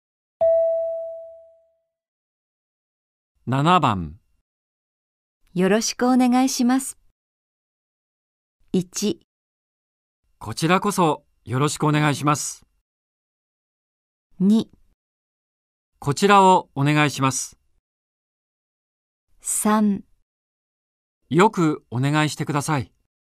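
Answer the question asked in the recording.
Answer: 1: こちらこそよろしくお願いします。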